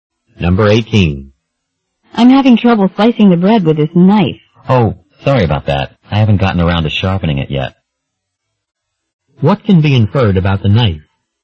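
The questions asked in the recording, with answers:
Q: What can be inferred about the knife?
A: It is dull.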